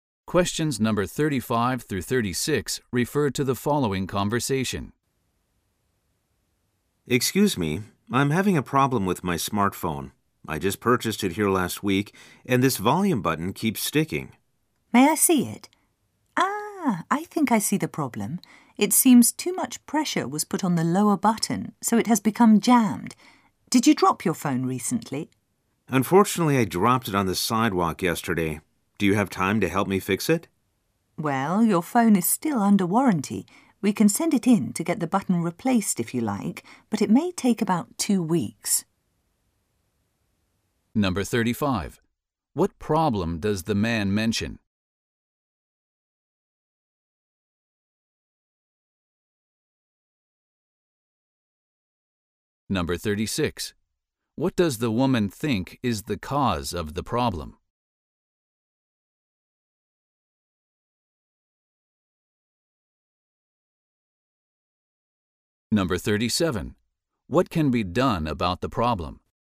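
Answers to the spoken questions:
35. The volume button on his new smartphone keeps sticking.
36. Too much pressure was put on the lower button, probably because he dropped the phone.
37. The phone can be sent in under warranty to have the button replaced, which may take about 2 weeks.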